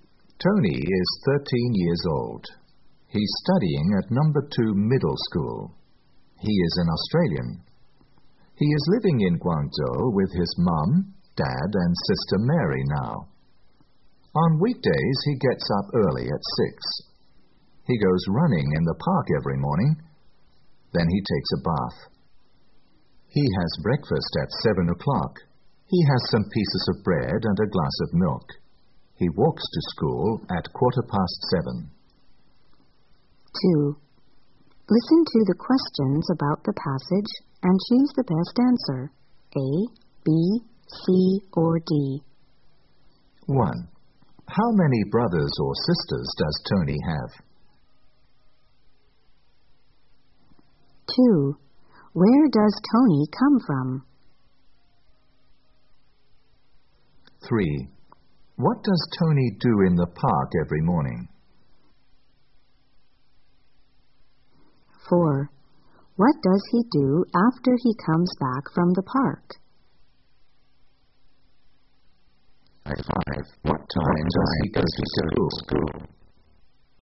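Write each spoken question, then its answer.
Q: How many brothers or sisters does Tony have?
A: One (a sister, Mary)

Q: Where does Tony come from?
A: Australia

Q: What does Tony do in the park every morning?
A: He goes running

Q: What does he do after he comes back from the park?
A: He takes a bath

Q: What time does he go to school?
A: At 7:15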